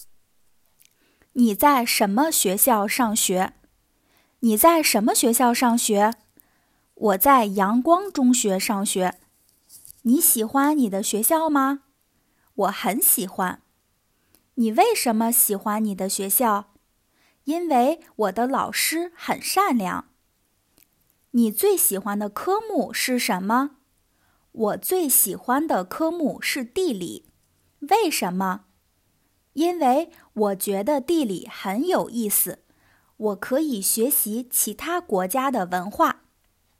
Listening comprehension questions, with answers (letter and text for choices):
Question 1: 莉莉在什么学校上学?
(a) 阳光中学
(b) 北京中学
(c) 迎宾小学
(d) 上海小学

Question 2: 丽丽最喜欢的科目是什么?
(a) 数学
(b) 科学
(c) 地理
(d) 历史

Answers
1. (a) 阳光中学
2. (c) 地理

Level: beginner's